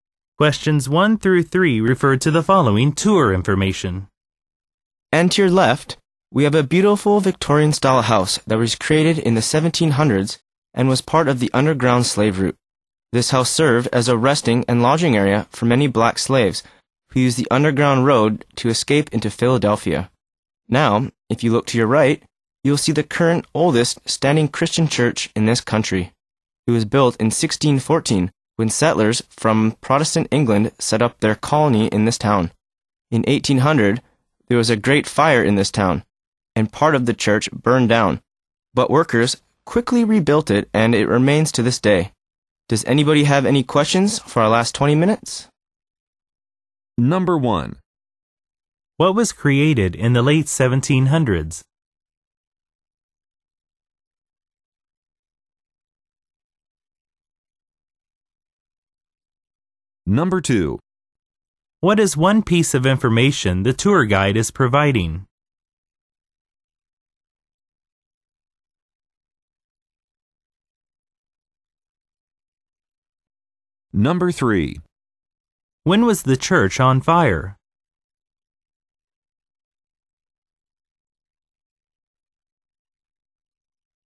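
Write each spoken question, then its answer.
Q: What was created in the late 1700s?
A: A Victorian-style house

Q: When was the church on fire?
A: In 1800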